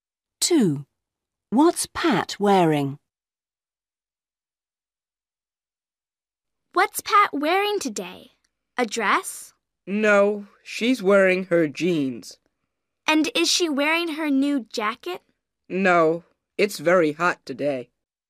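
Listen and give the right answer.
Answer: jeans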